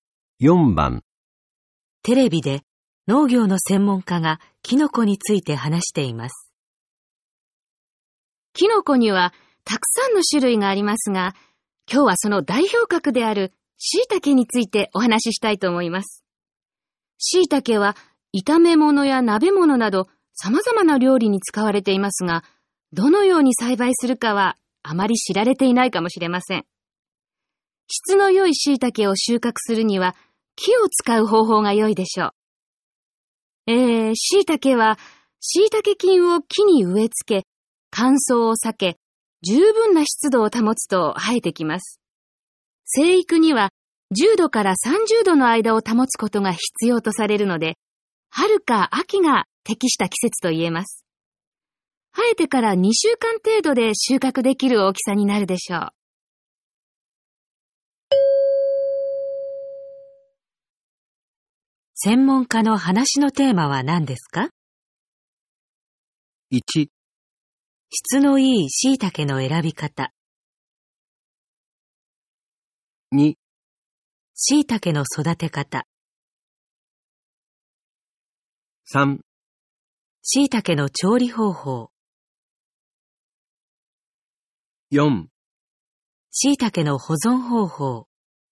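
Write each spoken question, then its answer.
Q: 専門家の話のテーマは何ですか?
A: 2: 椎茸の育て方。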